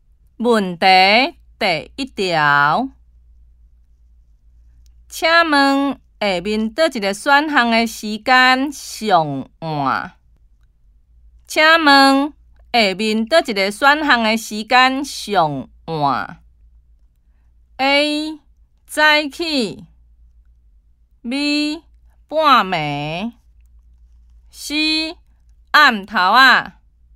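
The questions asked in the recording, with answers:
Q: 请问下面哪一个选项的时间上晚?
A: B: 半暝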